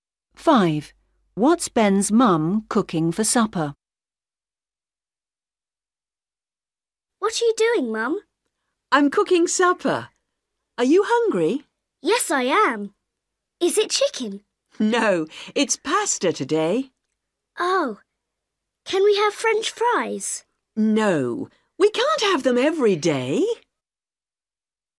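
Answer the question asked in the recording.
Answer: Pasta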